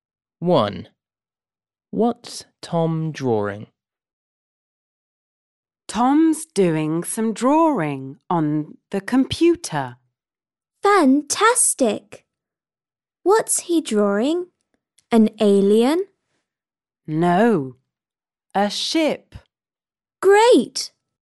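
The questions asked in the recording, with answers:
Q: What's Tom drawing?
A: a ship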